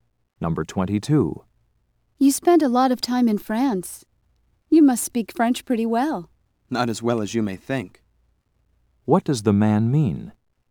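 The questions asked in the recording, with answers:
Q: What does the man mean?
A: His French is not very good.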